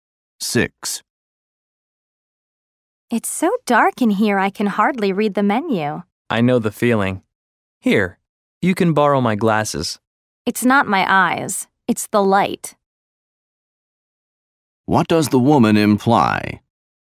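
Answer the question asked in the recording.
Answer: The room is too dark; her eyes are fine.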